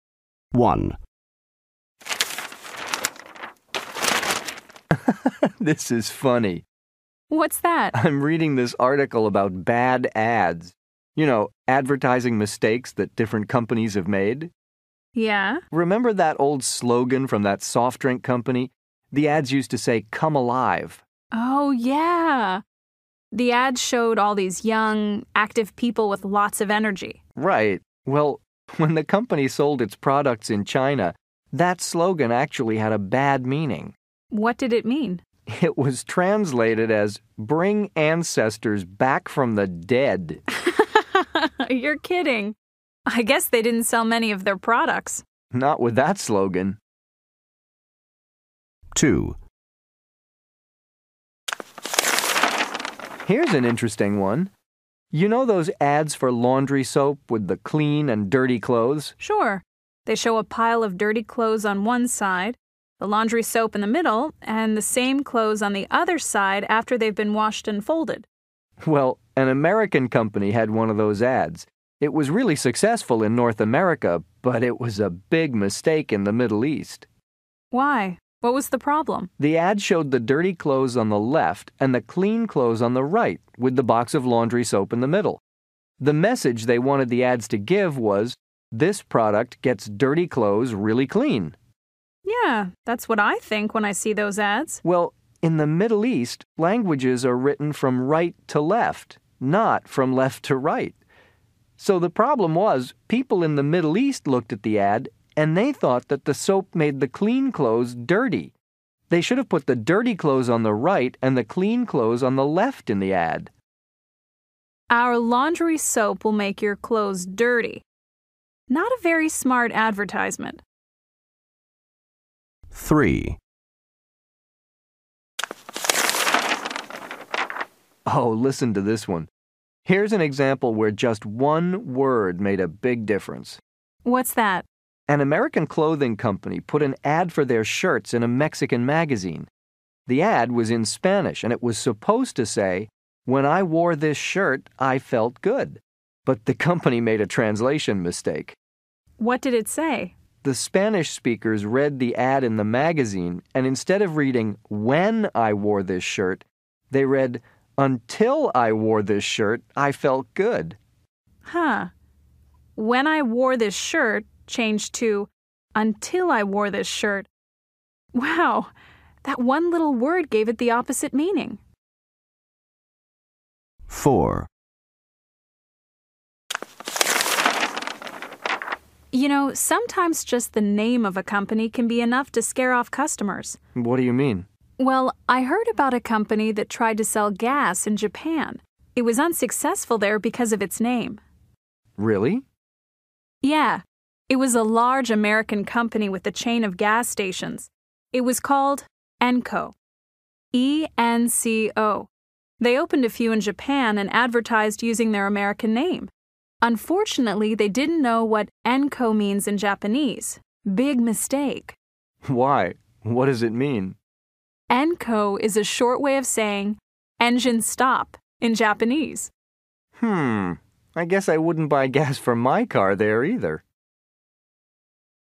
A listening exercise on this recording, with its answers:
B Listen again. What were the problems? Complete the sentences.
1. It was translated as "Bring ancestors ______________."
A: back from the dead

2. Languages are written ______________.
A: from right to left

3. People thought the product would make clothes ______________.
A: dirty

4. The first word should have been "______________."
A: When

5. The slogan was translated as "______________ I wore this shirt, I felt good."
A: Until

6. The company was unsuccessful because of its ______________.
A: name

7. It means "______________" in Japanese.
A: engine stop

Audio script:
1
Husband: This is funny.
Wife: What's that?
Husband: I'm reading this article about bad ads – you know, advertising mistakes that different companies have made.
Wife: Yeah?
Husband: Remember that old slogan from that soft drink company? The ads used to say "Come alive!"
Wife: Oh, yeah. The ads showed all these young, active people with lots of energy.
Husband: Right. Well, when the company sold its products in China, that slogan actually had a bad meaning.
Wife: What did it mean?
Husband: It was translated as "Bring ancestors back from the dead!"
Wife: You're kidding. I guess they didn't sell many of their products.
Husband: Not with that slogan.
2
Husband: Here's an interesting one. You know those ads for laundry soap with the clean and dirty clothes?
Wife: Sure. They show a pile of dirty clothes on one side, the laundry soap in the middle, and the same clothes on the other side after they've been washed and folded.
Husband: Well, an American company had one of those ads. It was really successful in North America, but it was a big mistake in the Middle East.
Wife: Why? What was the problem?
Husband: The ad showed the dirty clothes on the left and the clean clothes on the right with the box of laundry soap in the middle. The message they wanted the ads to give was "This product gets dirty clothes really clean."
Wife: Yeah. That's what I think when I see those ads.
Husband: Well, in the Middle East, languages are written from right to left, not from left to right. So, the problem was, people in the Middle East looked at the ad, and they thought that the soap made the clean clothes dirty! They should have put the dirty clothes on the right and the clean clothes on the left in the ad.
Wife: "Our laundry soap will make your clothes dirty." Not a very smart advertisement.
3
Husband: Oh, listen to this one. Here's an example where just one word made a big difference.
Wife: What's that?
Husband: An American clothing company put an ad for their shirts in a Mexican magazine. The ad was in Spanish, and it was supposed to say, "When I wore this shirt, I felt good." But the company made a translation mistake.
Husband: The Spanish speakers read the ad in the magazine, and instead of reading, "When I wore this shirt," they read "Until I wore this shirt, I felt good."
Wife: Huh. "When I wore this shirt" changed to "Until I wore this shirt." Wow. That one little word gave it the opposite meaning.
4
Wife: You know, sometimes just the name of a company can be enough to scare off customers.
Husband: What do you mean?
Wife: Well, I heard about a company that tried to sell gas in Japan. It was unsuccessful there because of its name.
Husband: Really?
Wife: Yeah. It was a large, American company with a chain of gas stations. It was called Enco – E-N-C-O. They opened a few in Japan and advertised using their American name. Unfortunately they didn't know what Enco means in Japanese. Big mistake.
Husband: Why? What does it mean?
Wife: Enco is a short way of saying "engine stop" in Japanese.
Husband: Hmm. I guess I wouldn't buy gas for my car there either.

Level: B2